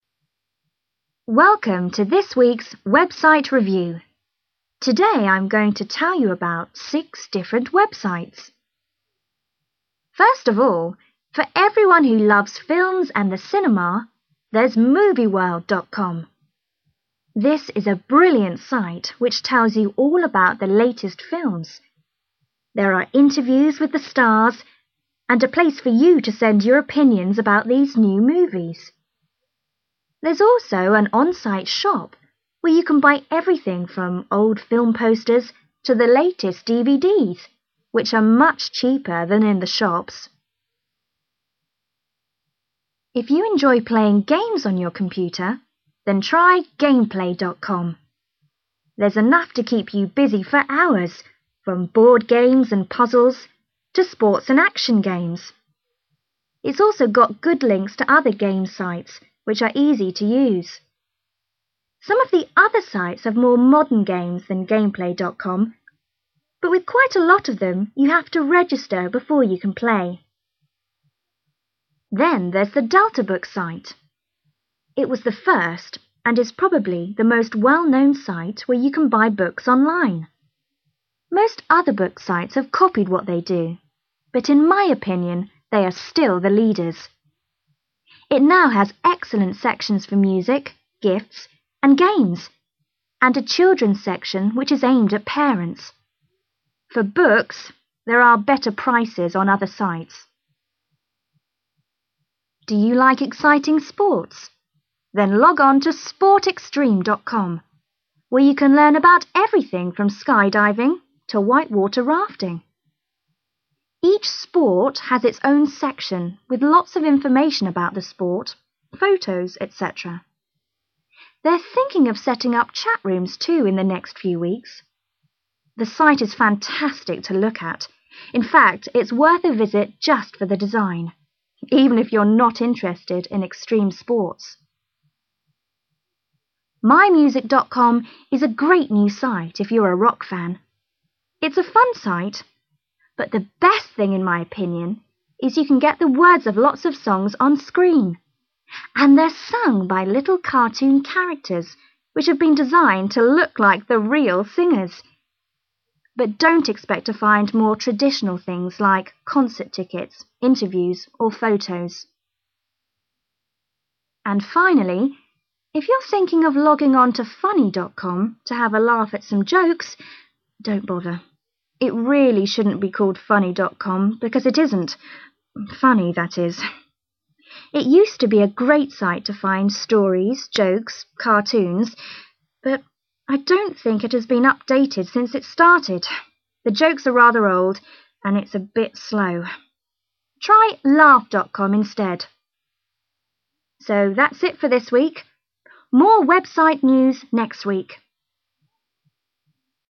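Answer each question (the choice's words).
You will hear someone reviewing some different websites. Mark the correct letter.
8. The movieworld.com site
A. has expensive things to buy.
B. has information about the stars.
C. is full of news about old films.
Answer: has information about the stars.

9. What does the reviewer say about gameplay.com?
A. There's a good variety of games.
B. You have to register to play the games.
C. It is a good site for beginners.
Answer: There's a good variety of games.

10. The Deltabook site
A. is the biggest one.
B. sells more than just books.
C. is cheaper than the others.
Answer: sells more than just books.

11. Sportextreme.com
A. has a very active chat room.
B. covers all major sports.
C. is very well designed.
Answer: is very well designed.

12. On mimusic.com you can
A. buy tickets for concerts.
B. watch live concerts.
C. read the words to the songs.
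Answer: read the words to the songs.

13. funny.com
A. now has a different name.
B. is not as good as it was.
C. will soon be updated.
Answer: is not as good as it was.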